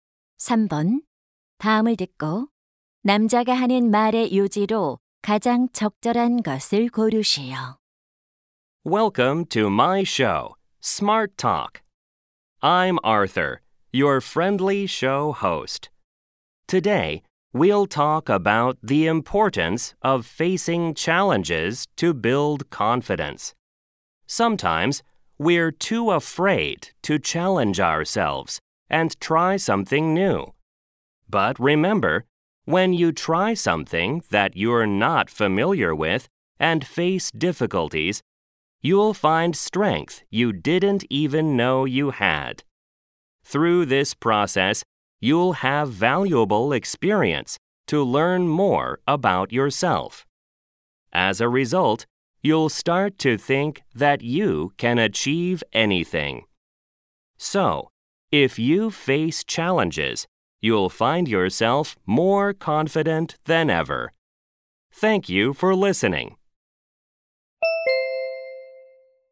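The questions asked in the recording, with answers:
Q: 다음을 듣고 남자가 하는 말의 요지로 가장 적절한 것을 고르시오.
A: 도전에 맞서면 자신감을 키울 수 있다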